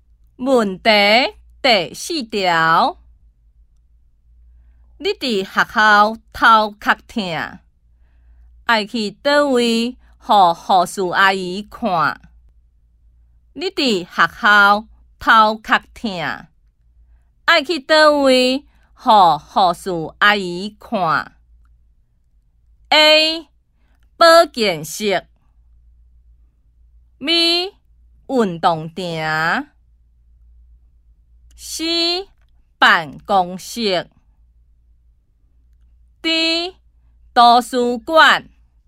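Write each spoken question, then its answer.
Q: 你伫学校头壳痛,爱去倒位予护士阿姨看。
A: A: 保健室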